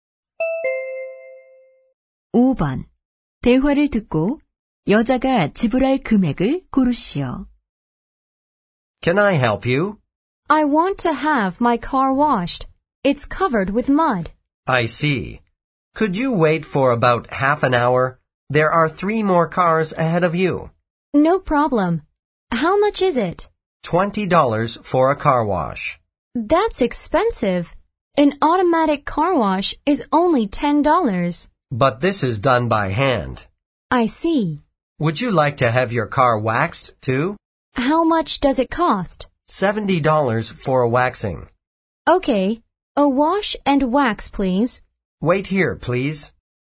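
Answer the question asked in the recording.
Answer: 90달러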